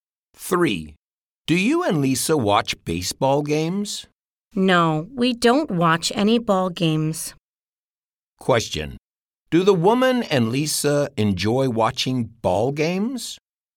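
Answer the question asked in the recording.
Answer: No, they don't.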